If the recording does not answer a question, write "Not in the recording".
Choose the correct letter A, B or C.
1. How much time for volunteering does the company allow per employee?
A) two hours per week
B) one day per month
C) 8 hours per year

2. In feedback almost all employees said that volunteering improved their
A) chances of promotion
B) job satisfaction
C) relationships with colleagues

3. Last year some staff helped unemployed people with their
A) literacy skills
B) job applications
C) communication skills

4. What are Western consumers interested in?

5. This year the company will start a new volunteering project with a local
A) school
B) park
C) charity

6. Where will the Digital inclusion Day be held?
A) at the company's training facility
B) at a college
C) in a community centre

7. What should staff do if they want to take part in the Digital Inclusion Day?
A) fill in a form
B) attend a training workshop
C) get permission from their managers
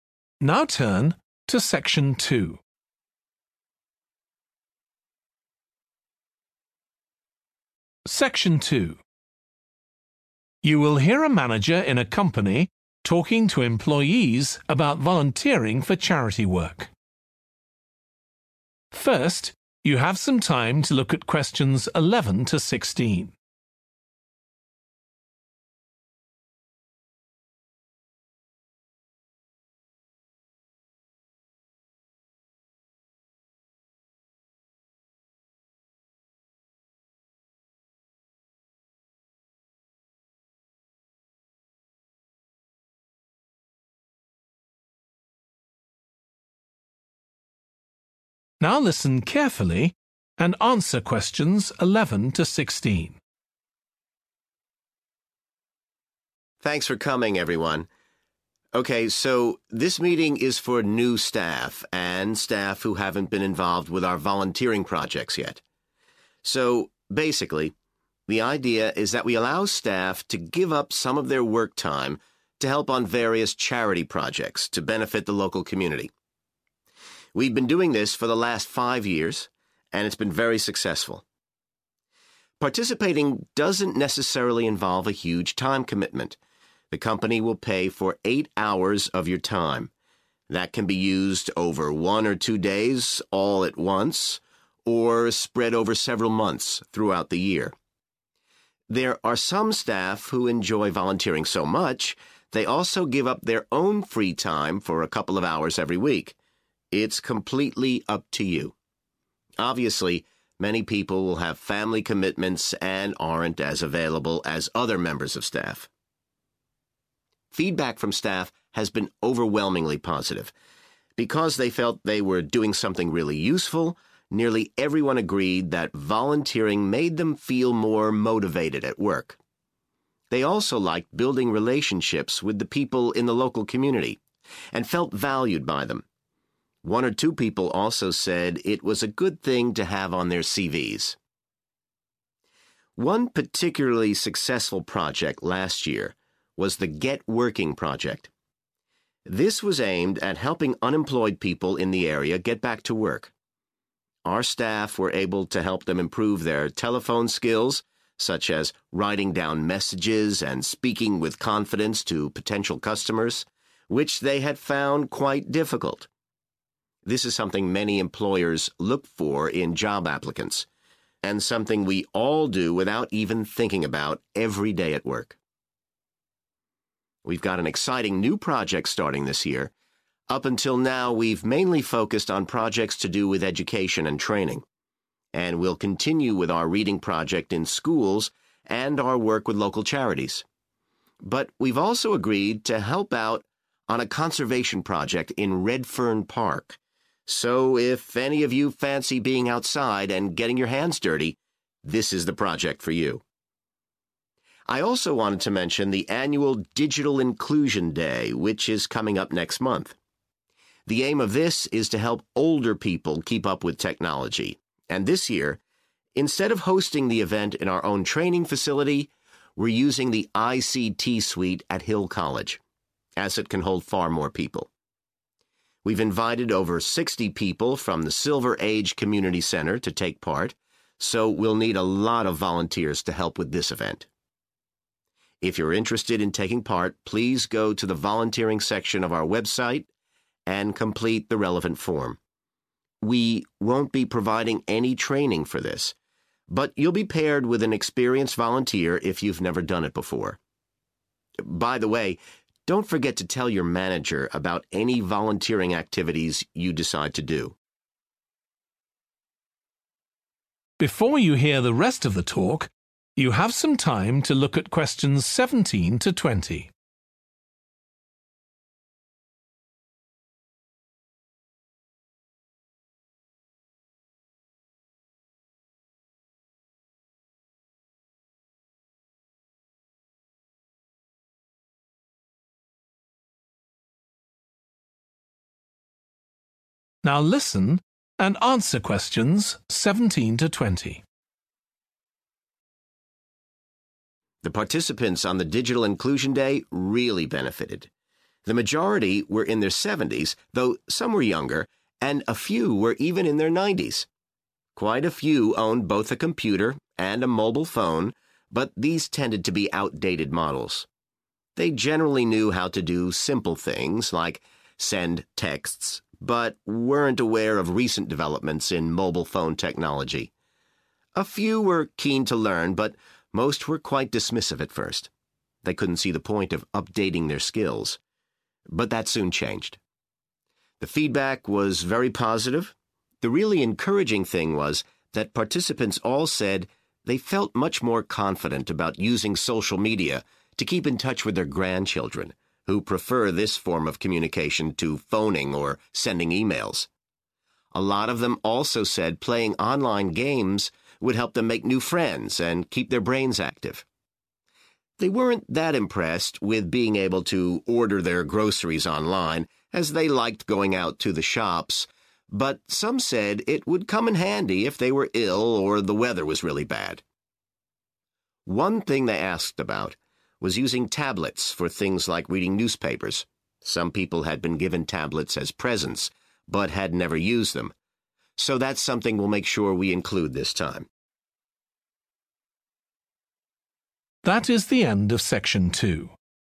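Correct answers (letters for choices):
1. C
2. B
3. C
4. Not in the recording
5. B
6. B
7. A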